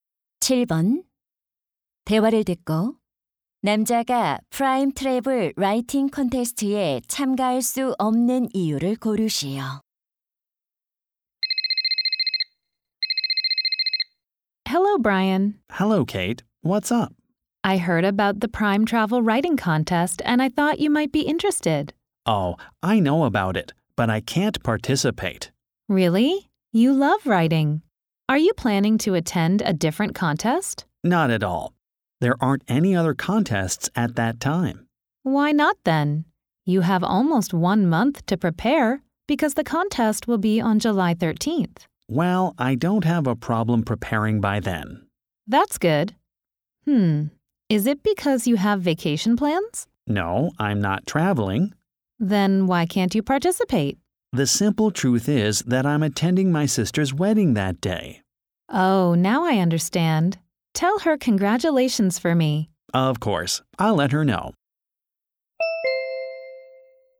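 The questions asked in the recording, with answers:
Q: 대화를 듣고 남자가 프라임 트래블 라이팅 콘테스트에 참가할 수 없는 이유를 고르시오.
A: 여동생의 결혼식에 참석해야 해서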